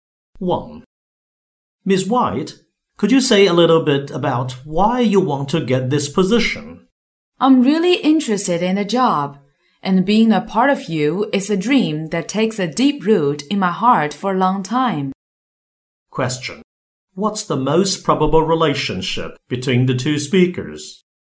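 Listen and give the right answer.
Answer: Interviewer and job applicant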